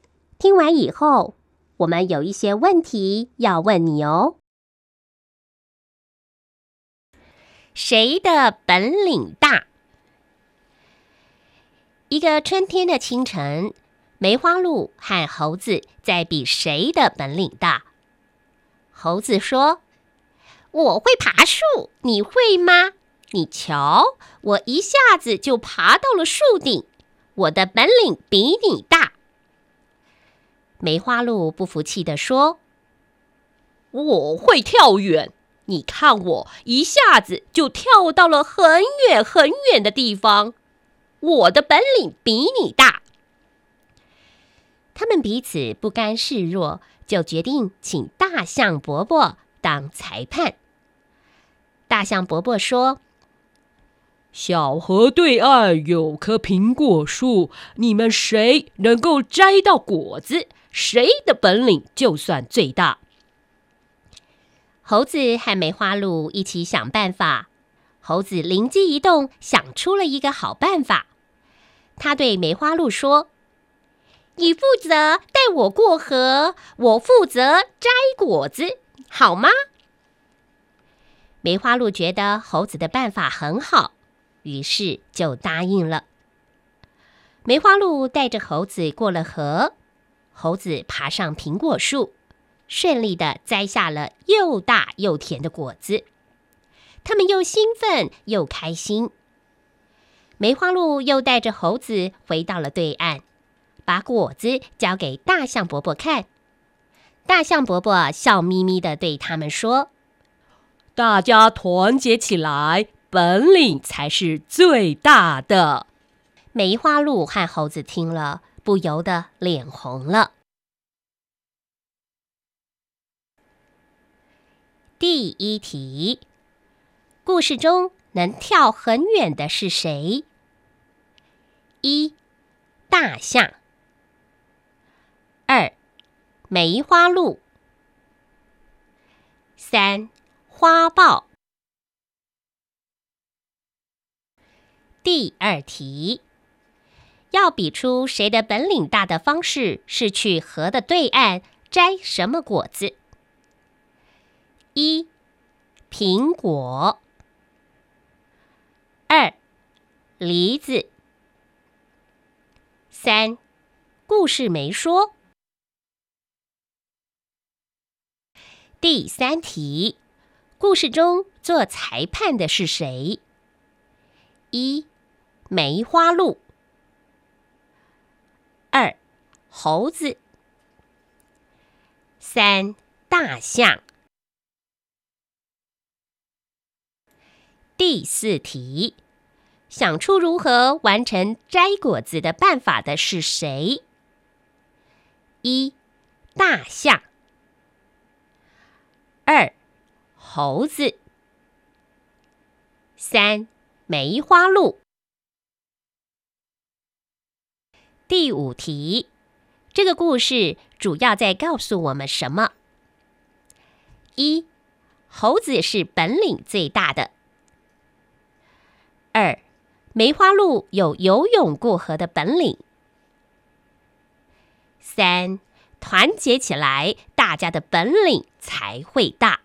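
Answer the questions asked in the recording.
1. 二: 梅花鹿
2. 一: 苹果
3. 三: 大象
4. 二: 猴子
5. 三: 团结起来,大家的本领才会大。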